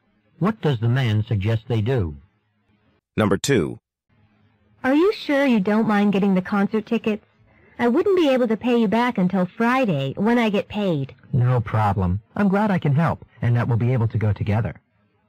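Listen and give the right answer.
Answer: He's glad to get the tickets and can wait until Friday to be paid back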